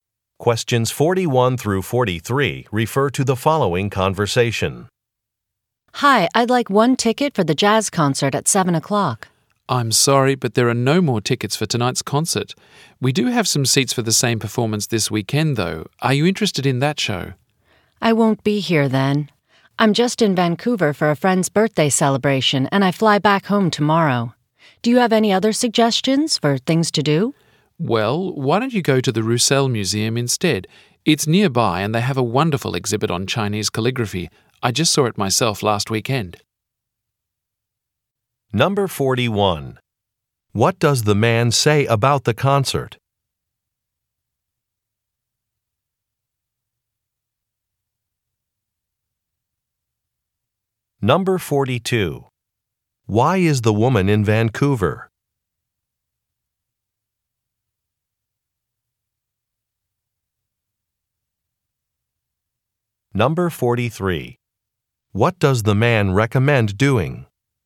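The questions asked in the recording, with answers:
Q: What does the man say about the concert?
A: It is sold out

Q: Why is the woman in Vancouver?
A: For a friend's birthday celebration

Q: What does the man recommend doing?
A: Visiting the Roussel Museum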